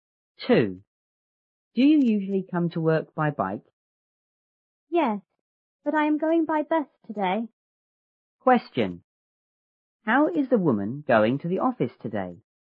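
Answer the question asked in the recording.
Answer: By bus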